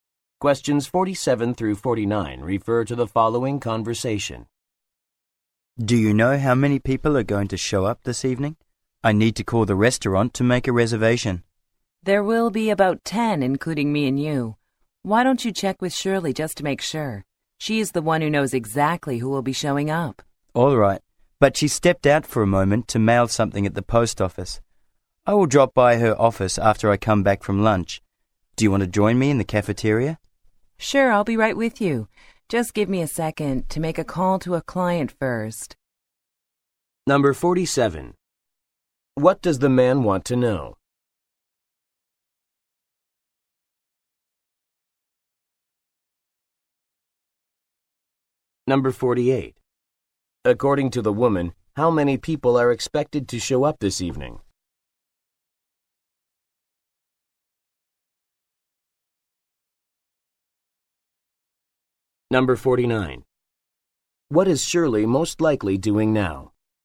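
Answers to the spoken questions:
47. How many people will come this evening
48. About 10
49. Mailing something at the post office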